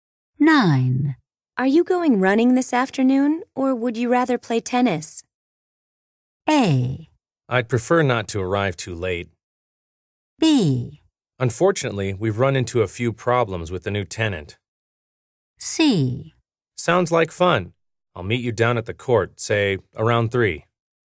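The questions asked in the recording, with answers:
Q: Are you going running this afternoon, or would you rather play tennis?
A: C: Sounds like fun. I'll meet you down at the court, say, around 3.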